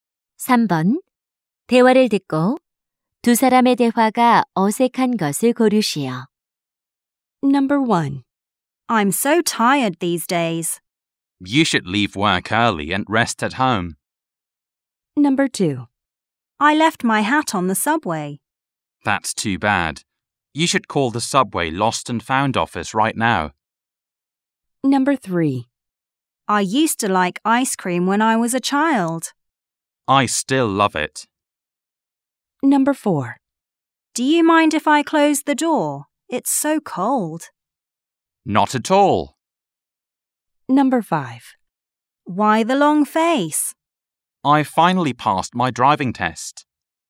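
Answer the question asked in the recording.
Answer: 5: Why the long face? / I finally passed my driving test.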